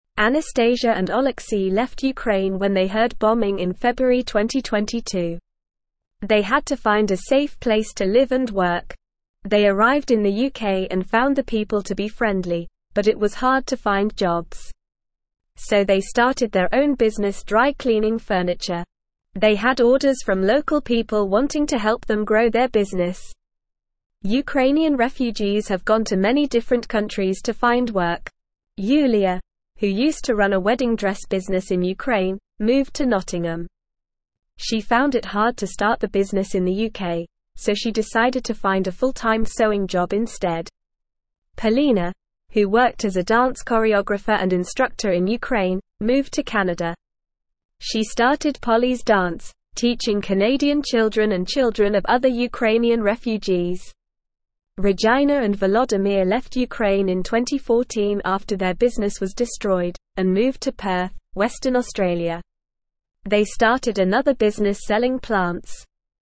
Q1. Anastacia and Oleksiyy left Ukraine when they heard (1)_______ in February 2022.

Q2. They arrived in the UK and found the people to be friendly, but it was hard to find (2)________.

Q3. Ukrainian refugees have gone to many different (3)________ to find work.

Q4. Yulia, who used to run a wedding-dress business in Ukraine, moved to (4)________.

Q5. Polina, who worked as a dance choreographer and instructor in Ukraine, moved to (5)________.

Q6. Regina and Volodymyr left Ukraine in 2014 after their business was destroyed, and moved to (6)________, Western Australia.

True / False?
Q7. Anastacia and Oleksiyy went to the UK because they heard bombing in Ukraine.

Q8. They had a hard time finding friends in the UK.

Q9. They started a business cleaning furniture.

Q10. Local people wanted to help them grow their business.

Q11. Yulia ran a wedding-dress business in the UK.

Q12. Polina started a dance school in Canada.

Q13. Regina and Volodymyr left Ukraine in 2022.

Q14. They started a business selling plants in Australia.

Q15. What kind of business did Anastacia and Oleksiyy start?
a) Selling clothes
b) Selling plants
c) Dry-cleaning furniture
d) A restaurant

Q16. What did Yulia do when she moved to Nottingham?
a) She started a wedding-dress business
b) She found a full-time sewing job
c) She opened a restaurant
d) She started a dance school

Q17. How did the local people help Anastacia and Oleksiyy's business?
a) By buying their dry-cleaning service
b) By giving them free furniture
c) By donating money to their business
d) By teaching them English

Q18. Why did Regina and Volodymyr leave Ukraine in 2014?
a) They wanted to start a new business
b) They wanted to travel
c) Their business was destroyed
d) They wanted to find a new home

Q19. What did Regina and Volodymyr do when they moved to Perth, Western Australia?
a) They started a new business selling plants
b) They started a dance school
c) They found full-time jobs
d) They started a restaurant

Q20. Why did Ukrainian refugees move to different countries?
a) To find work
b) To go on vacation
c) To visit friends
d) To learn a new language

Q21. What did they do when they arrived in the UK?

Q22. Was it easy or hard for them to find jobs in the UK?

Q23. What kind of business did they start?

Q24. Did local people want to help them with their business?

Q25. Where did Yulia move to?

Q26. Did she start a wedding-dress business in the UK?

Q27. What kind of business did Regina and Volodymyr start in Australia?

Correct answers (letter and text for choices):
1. bombing
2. jobs
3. countries
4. Nottingham
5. Canada
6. Perth
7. True
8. False
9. True
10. True
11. False
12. True
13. False
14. True
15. c) Dry-cleaning furniture
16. b) She found a full-time sewing job
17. a) By buying their dry-cleaning service
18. c) Their business was destroyed
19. a) They started a new business selling plants
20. a) To find work
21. They arrived in the UK and started their own business.
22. It was hard for them to find jobs in the UK.
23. They started a dry-cleaning furniture business.
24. Yes, local people wanted to help them with their business.
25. Yulia moved to Nottingham.
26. No, she did not start a wedding-dress business in the UK.
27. They started a business selling plants.

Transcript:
Anastacia and Oleksiyy left Ukraine when they heard bombing in February 2022. They had to find a safe place to live and work. They arrived in the UK and found the people to be friendly, but it was hard to find jobs. So they started their own business dry-cleaning furniture. They had orders from local people wanting to help them grow their business. Ukrainian refugees have gone to many different countries to find work. Yulia, who used to run a wedding-dress business in Ukraine, moved to Nottingham. She found it hard to start the business in the UK, so she decided to find a full-time sewing job instead. Polina, who worked as a dance choreographer and instructor in Ukraine, moved to Canada. She started Polli's Dance, teaching Canadian children and children of other Ukrainian refugees. Regina and Volodymyr left Ukraine in 2014 after their business was destroyed, and moved to Perth, Western Australia. They started another business selling plants.

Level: Level 1